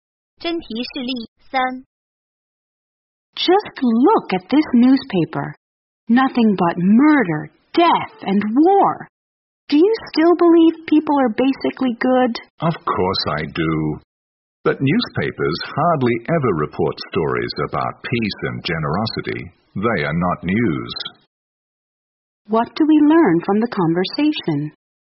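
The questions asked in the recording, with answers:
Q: What do we learn from the conversation?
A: Newspapers rarely report good news about peace and generosity.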